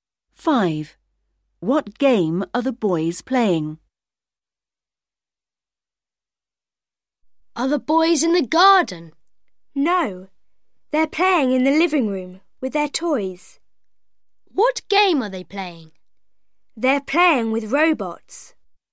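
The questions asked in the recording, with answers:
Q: What game are the boys playing?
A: Robots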